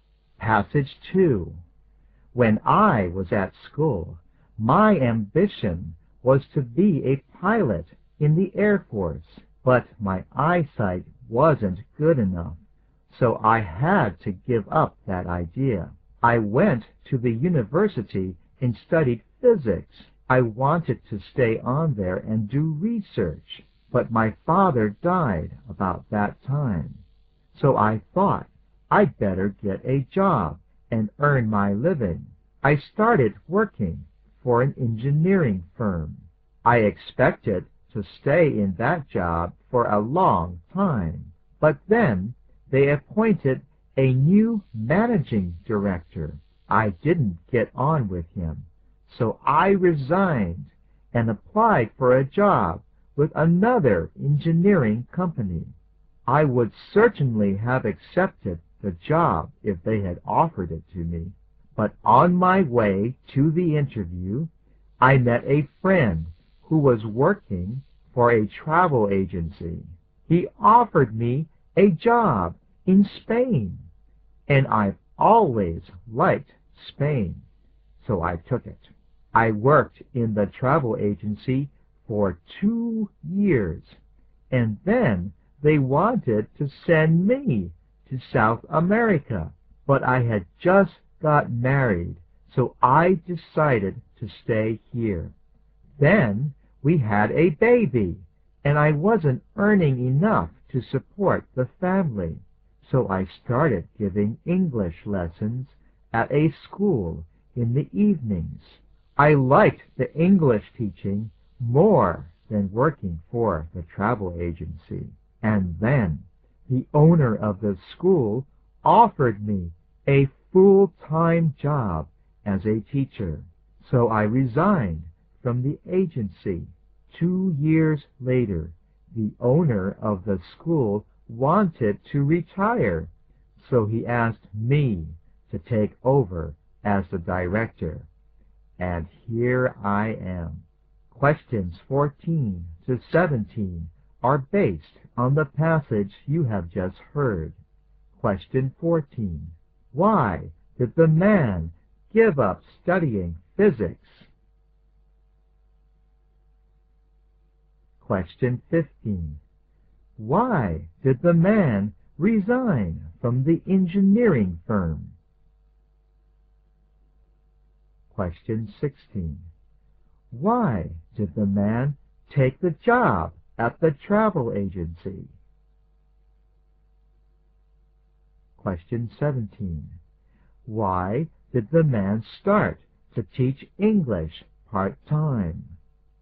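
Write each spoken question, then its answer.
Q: Why did the man give up studying physics?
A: His father died, so he needed to earn a living

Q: Why did the man resign from the engineering firm?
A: He didn't get on with the new managing director

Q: Why did the man take the job at the travel agency?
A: He was offered a job in Spain, which he liked

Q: Why did the man start to teach English part-time?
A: He wasn't earning enough to support his family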